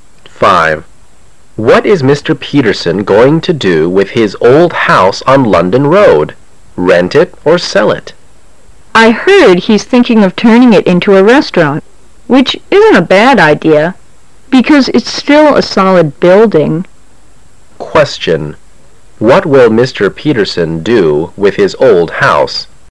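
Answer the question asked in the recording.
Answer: Probably turn it into a restaurant

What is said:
A
[解析] M: What is Mr. Peterson going to do with his old house on London Road? Rent it or sell it? W: I heard he's thinking of turning it into a restaurant, which isn't a bad idea, because it's still a solid building. Q: What will Mr.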